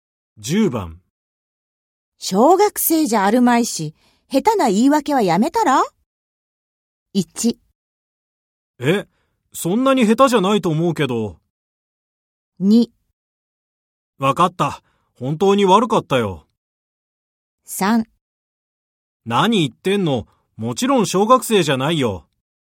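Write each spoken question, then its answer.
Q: 小学生じゃあるまいし、下手な言い訳はやめたら?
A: 2: わかった。本当に悪かったよ。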